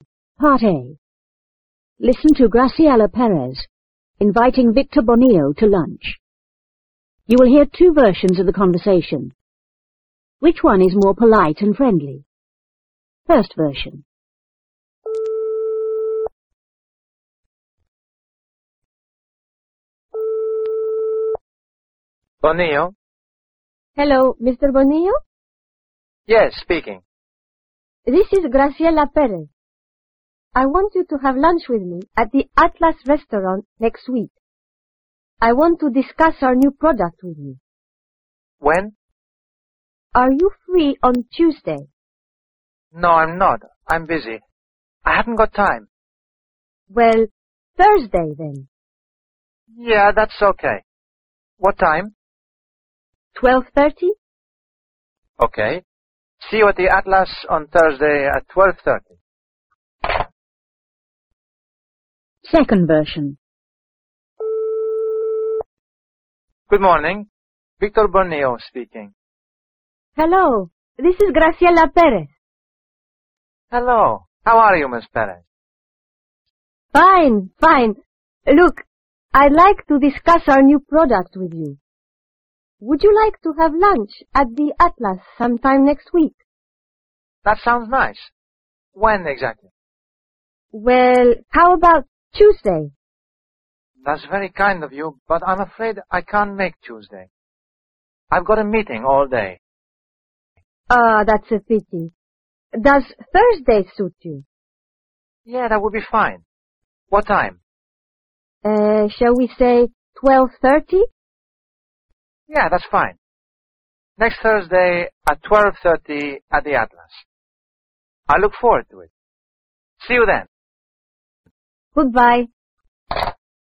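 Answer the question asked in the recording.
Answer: The second version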